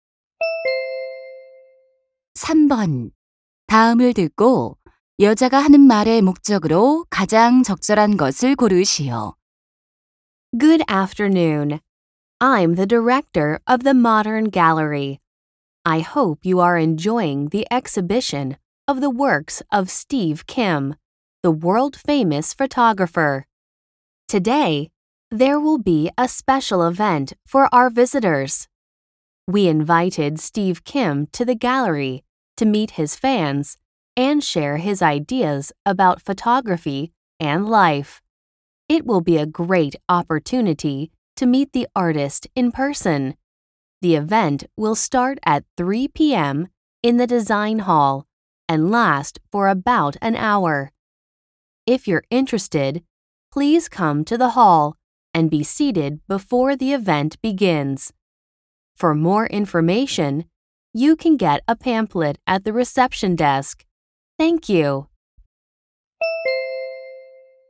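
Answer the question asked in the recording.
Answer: 사진작가 Steve Kim과의 만남 행사를 안내하려고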